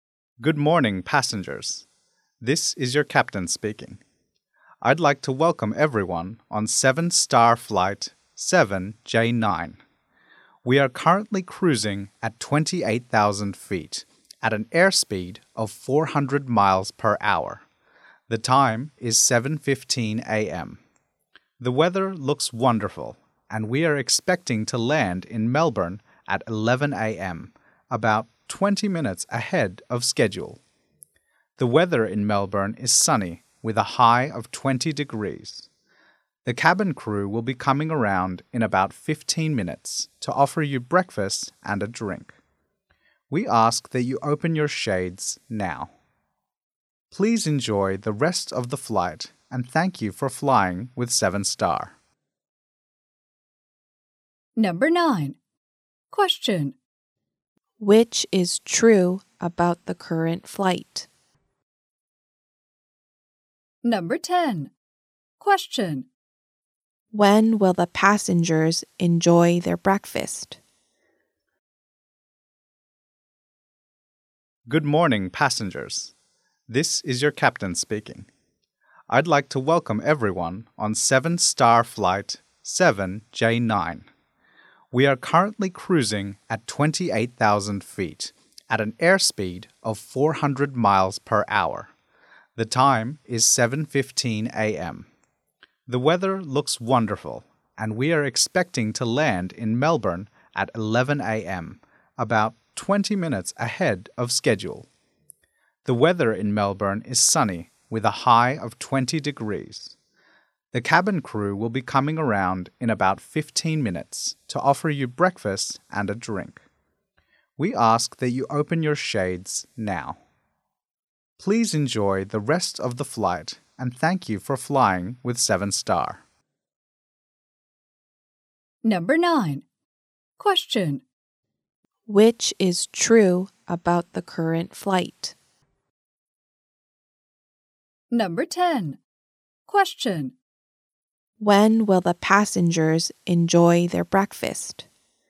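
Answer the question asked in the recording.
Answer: In about 15 minutes (around 7:30 a.m.).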